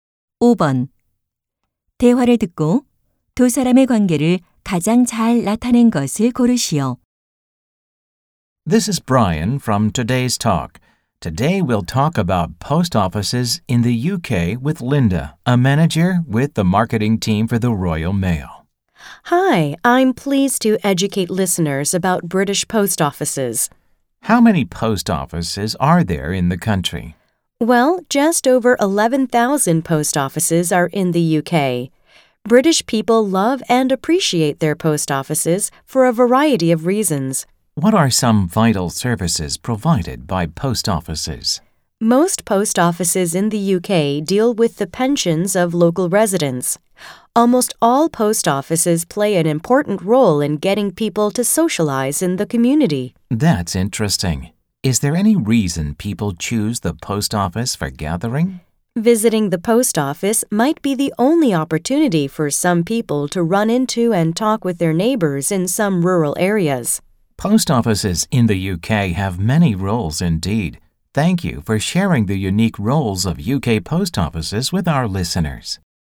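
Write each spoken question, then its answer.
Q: 대화를 듣고 두 사람의 관계를 가장 잘 나타낸 것을 고르시오.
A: 라디오 진행자 - 우체국(Royal Mail) 마케팅 매니저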